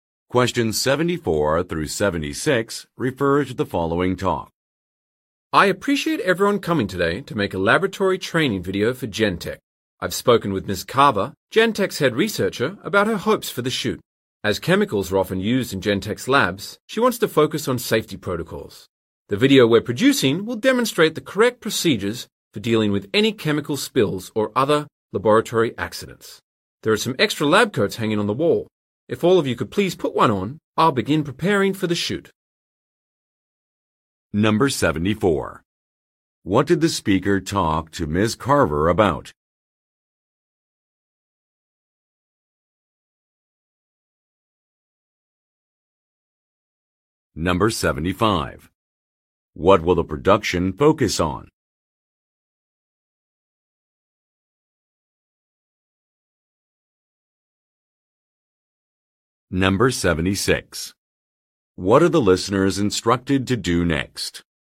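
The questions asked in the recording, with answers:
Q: What did the speaker talk to Ms. Carver about?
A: Her hopes for the video shoot

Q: What will the production focus on?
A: Laboratory safety procedures

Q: What are the listeners instructed to do next?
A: Put on lab coats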